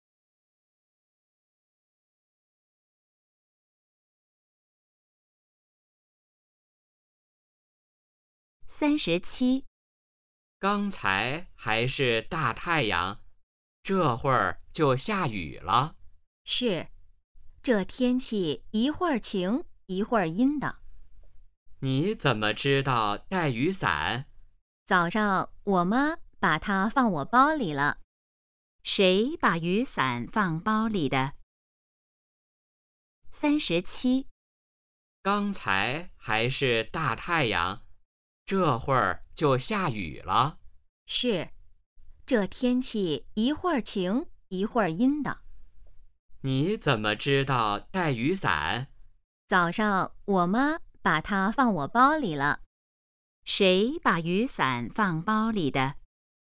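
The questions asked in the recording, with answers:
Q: 谁把雨伞放包里的?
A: 妈妈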